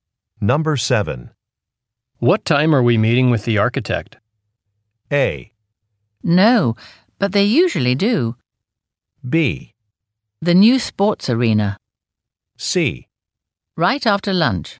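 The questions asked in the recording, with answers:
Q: What time are we meeting with the architect?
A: C: Right after lunch.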